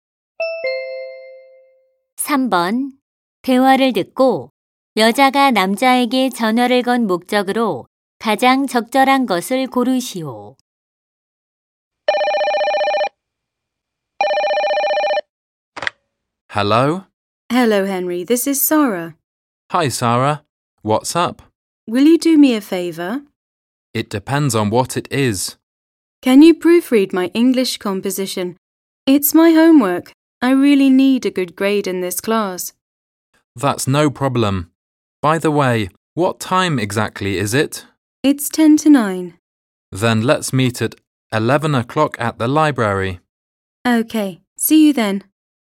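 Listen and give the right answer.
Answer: 영어 작문 교정을 부탁하려고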